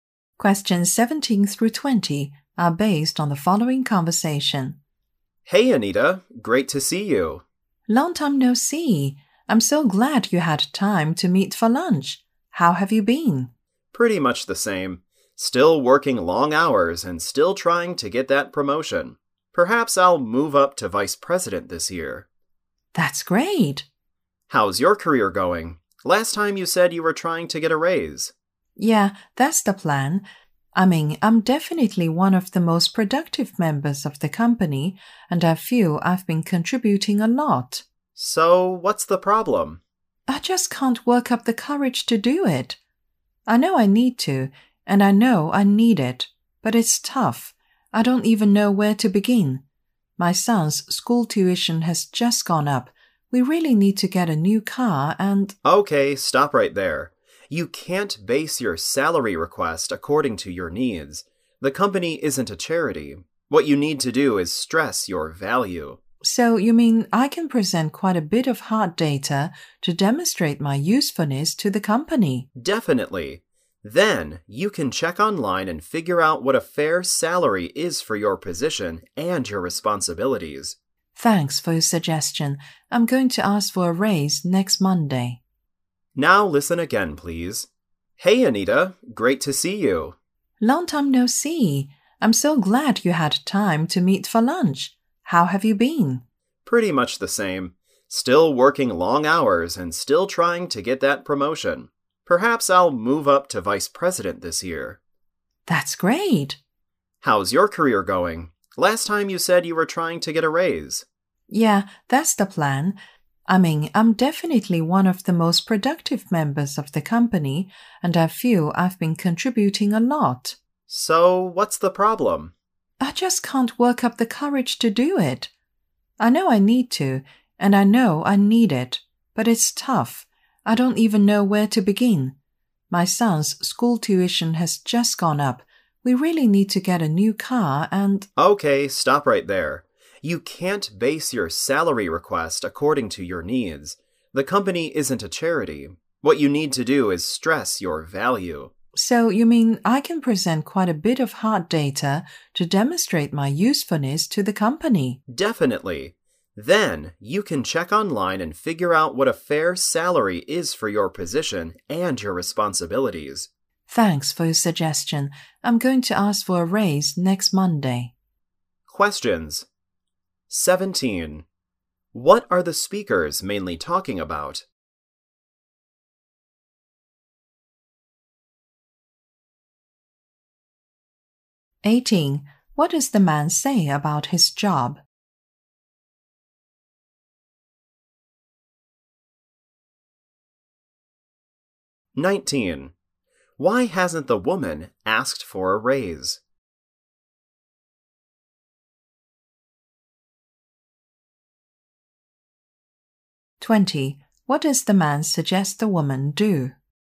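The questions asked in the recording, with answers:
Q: What are the speakers mainly talking about?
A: How the woman can ask for a raise

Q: What does the man say about his job?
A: He still works long hours and hopes to be promoted to vice president

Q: Why hasn't the woman asked for a raise?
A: She can't work up the courage

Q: What does the man suggest the woman do?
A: Stress her value with hard data and check online what a fair salary is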